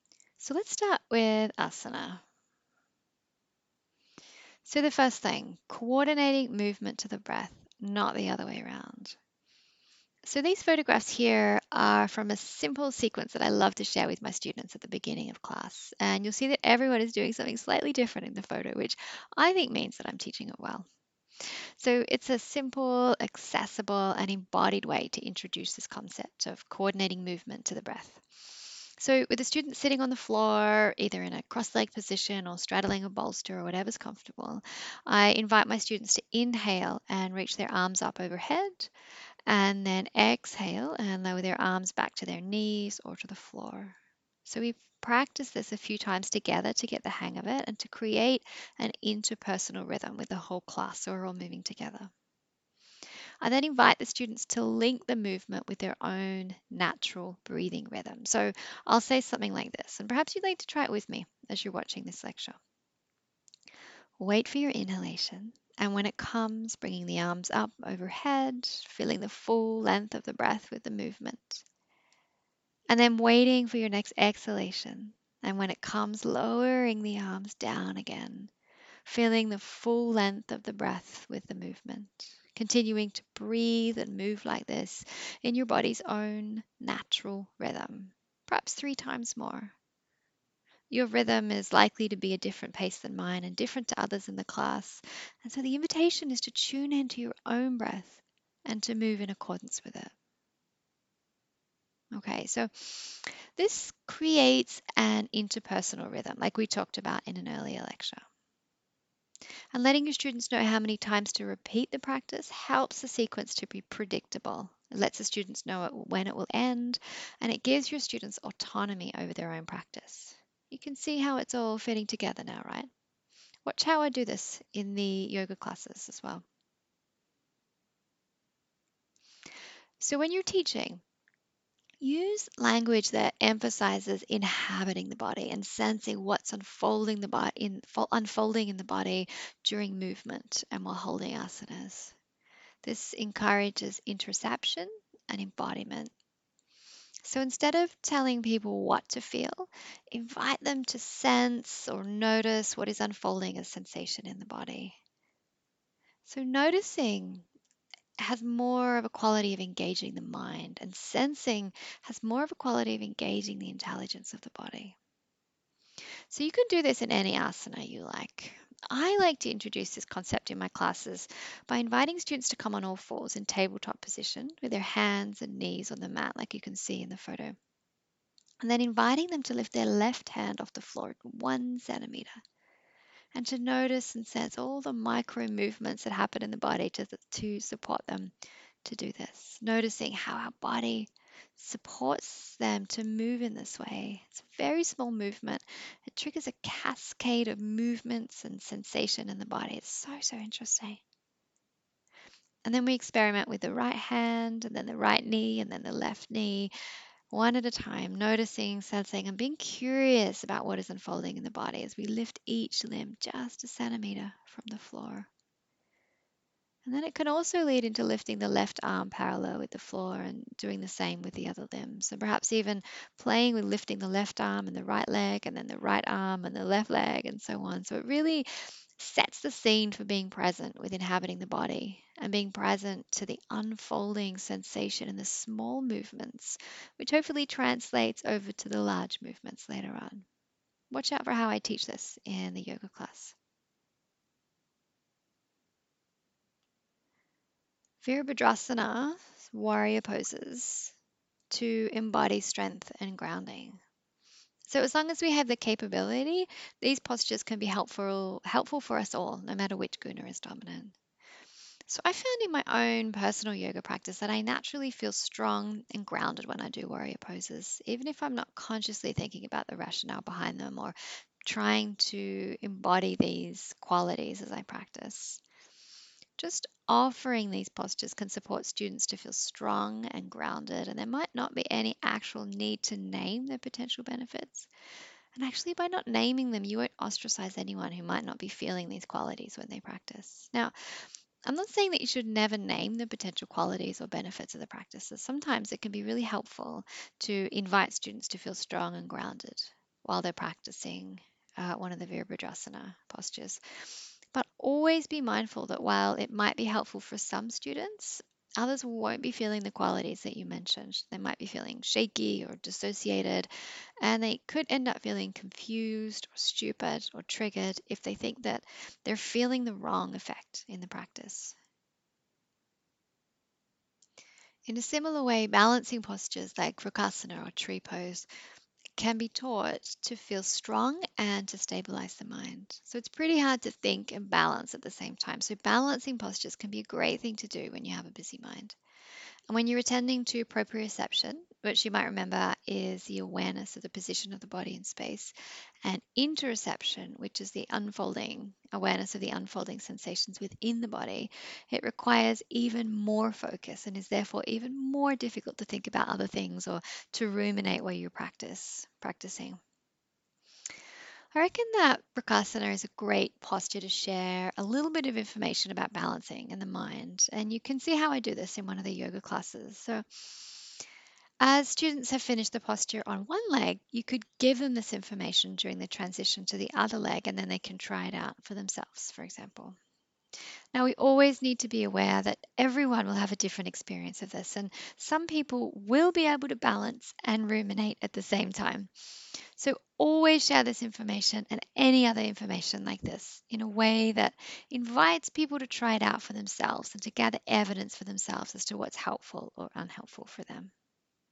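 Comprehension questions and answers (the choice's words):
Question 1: When teaching āsana, what can be helpful in reducing rajas and tamas, and in doing so cultivating sattva?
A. Co-ordinating movement to the breath (not the other way around).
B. Emphasis on inhabiting, sensing and noticing what is unfolding in the body during movement and while holding āsanas.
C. Vīrabhadrāsana poses to embody strength and grounding and balancing postures to feel strong and to stabilise the mind.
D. All of the above.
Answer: All of the above.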